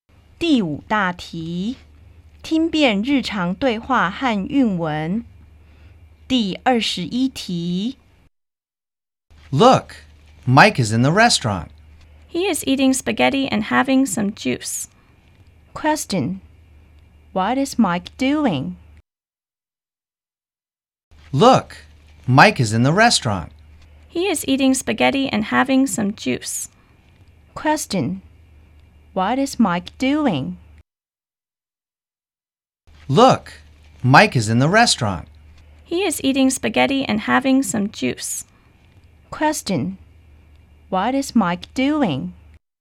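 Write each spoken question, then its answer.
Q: Question. What is Mike doing?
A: He is eating spaghetti and having some juice.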